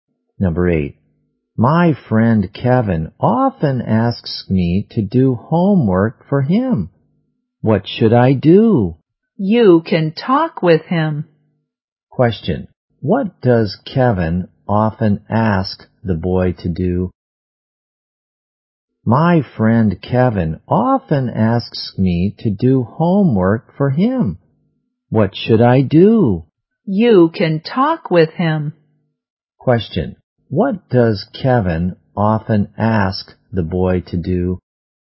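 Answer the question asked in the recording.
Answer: Do homework for him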